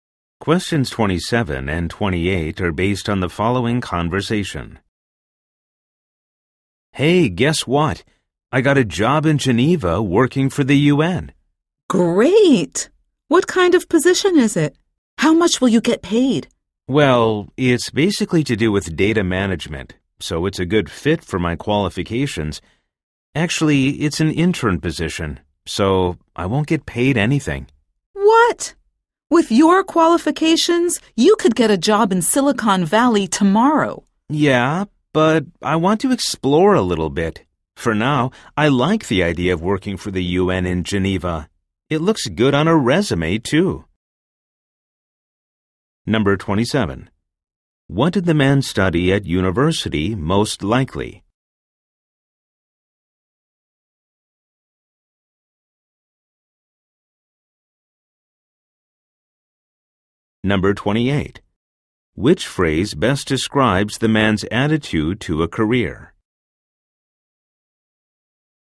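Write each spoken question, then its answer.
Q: Which phrase best describes the man's attitude to a career?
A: He wants to explore and gain experience rather than money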